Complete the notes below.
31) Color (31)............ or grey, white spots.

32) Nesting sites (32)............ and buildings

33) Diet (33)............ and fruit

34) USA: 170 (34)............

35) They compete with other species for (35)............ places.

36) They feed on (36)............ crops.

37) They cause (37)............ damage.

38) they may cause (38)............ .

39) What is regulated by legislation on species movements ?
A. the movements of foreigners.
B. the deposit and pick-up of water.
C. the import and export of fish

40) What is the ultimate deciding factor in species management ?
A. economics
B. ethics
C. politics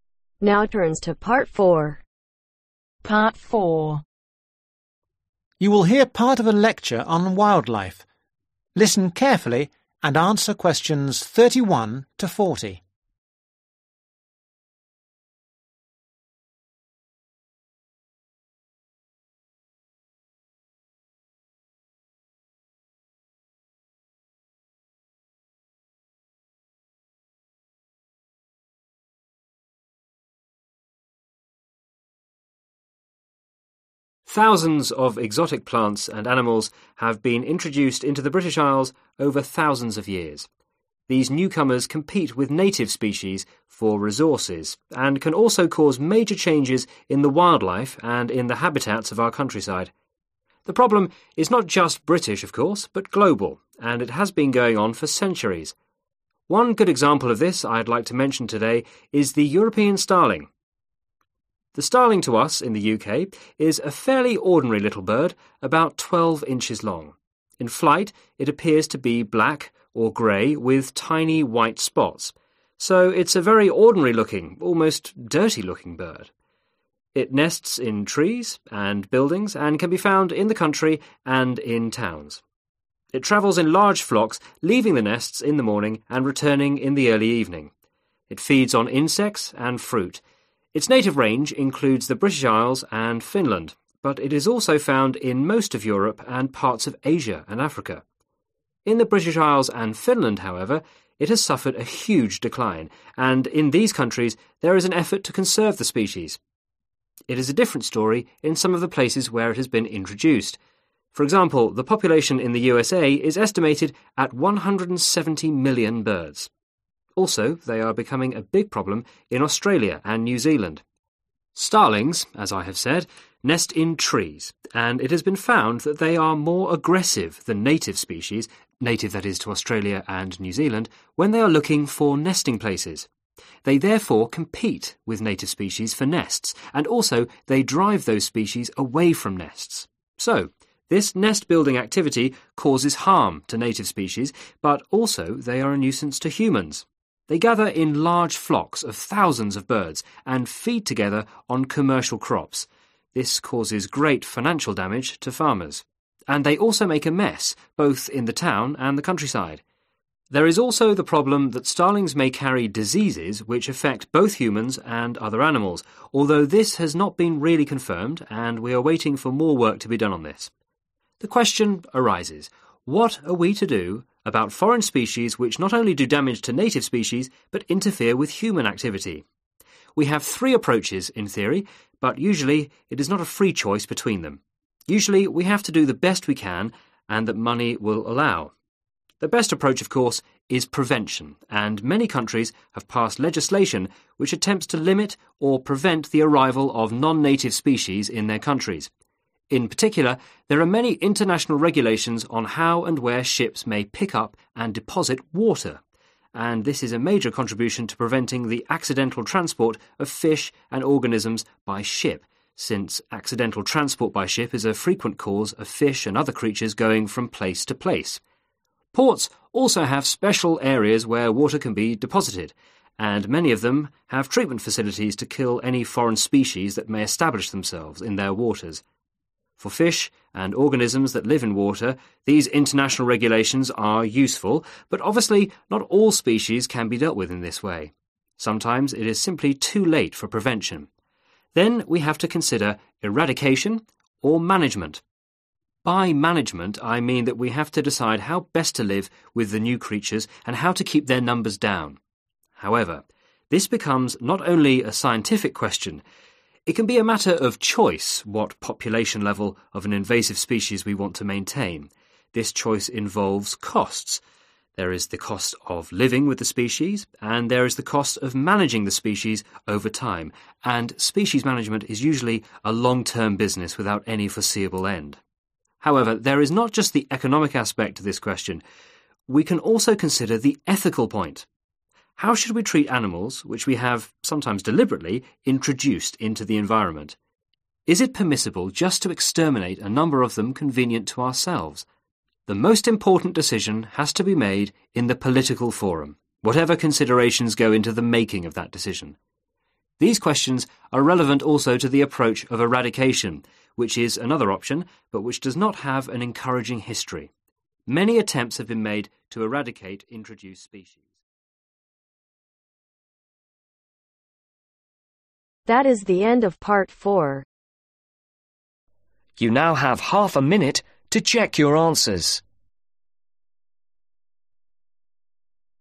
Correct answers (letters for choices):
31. Black
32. Trees
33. Insects
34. Million
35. Nesting
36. Commercial
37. Financial
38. Diseases
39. B
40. C